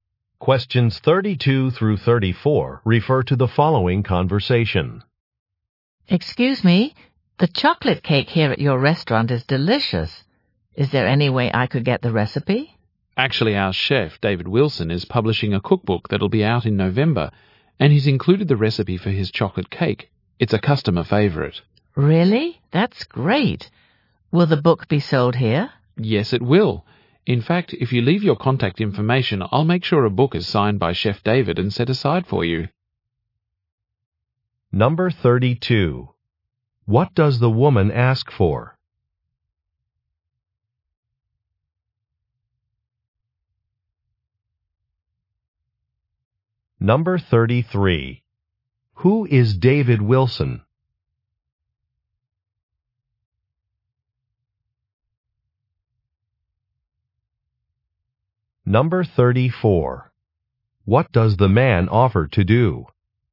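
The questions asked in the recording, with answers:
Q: What does the woman ask for?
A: The recipe for the chocolate cake

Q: Who is David Wilson?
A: The restaurant's chef

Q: What does the man offer to do?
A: Have a signed cookbook set aside for her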